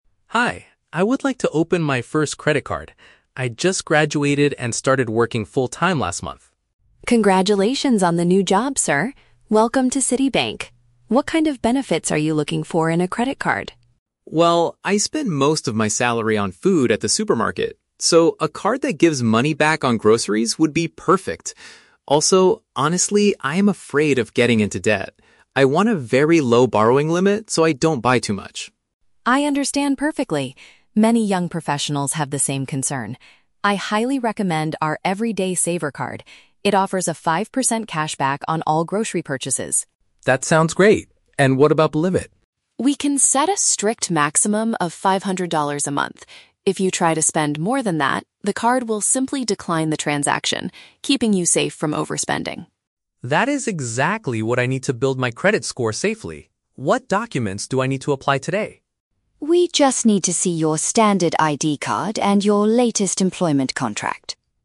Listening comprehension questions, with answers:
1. Why does Tom request a low limit on his new credit card?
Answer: To avoid accumulating large amounts of borrowed money.

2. What is the main advantage of the card Emily recommends?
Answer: It returns a percentage of the cash he spends on food shopping.

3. What paperwork must Tom provide to successfully get the card?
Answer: His personal identification and proof of his current job.

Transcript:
Tom: Hi, I would like to open my first credit card. I just graduated and started working full-time last month.
Emily: Congratulations on the new job, sir! What kind of benefits are you looking for in a credit card?
Tom: Well, I spend most of my salary on food at the supermarket. So, a card that gives money back on groceries would be perfect. Also, honestly, I am afraid of getting into debt. I want a very low borrowing limit so I don't buy too much.
Emily: I understand perfectly. Many young professionals have the same concern. I highly recommend our "Everyday Saver" card. It offers a five percent cashback on all grocery purchases.
Tom: That sounds great. And what about the limit?
Emily: We can set a strict maximum of five hundred dollars a month. If you try to spend more than that, the card will simply decline the transaction, keeping you safe from overspending.
Tom: That is exactly what I need to build my credit score safely. What documents do I need to apply today?
Emily: We just need to see your standard ID card and your latest employment contract.